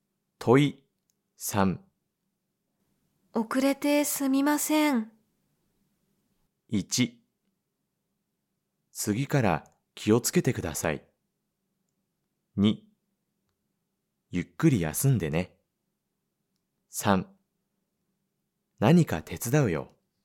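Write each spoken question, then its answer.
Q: 遅れてすみません。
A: 1: 次から気をつけてください。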